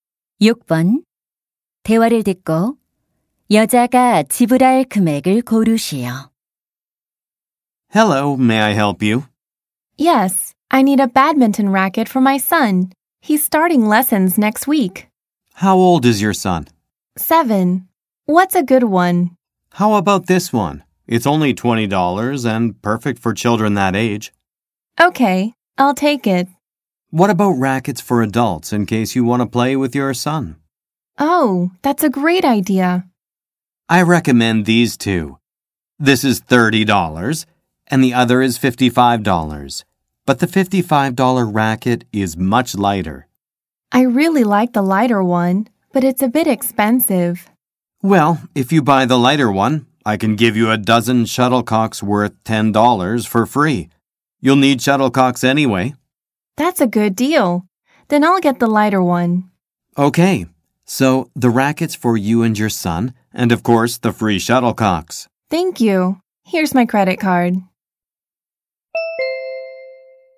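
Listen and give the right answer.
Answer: $75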